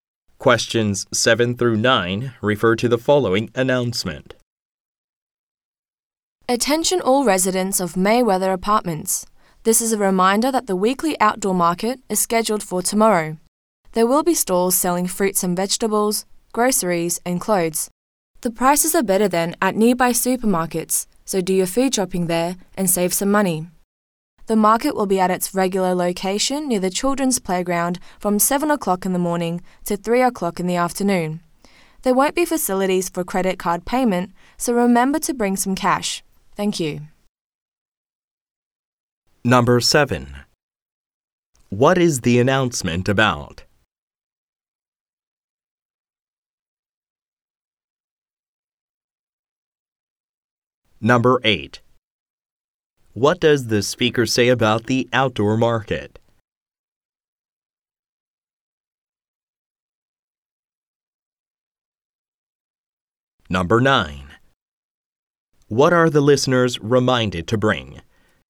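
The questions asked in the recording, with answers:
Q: What is the announcement about?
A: The weekly outdoor market tomorrow

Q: What are the listeners reminded to bring?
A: Cash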